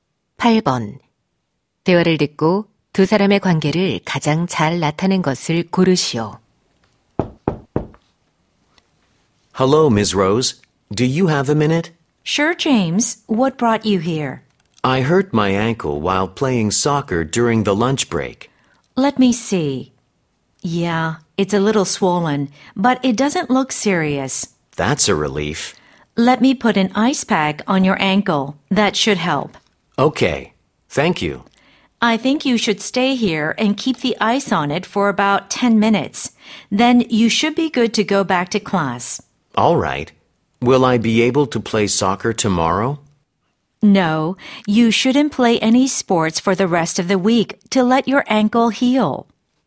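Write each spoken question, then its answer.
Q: 대화를 듣고 두 사람의 관계를 가장 잘 나타낸 것을 고르시오.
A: 보건 교사 - 학생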